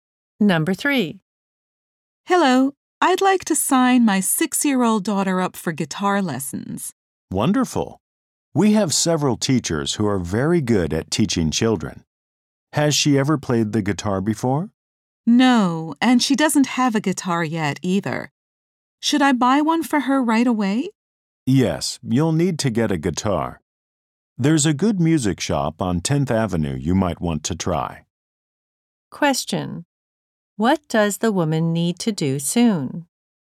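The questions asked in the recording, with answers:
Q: What does the woman need to do soon?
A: Buy a guitar for her daughter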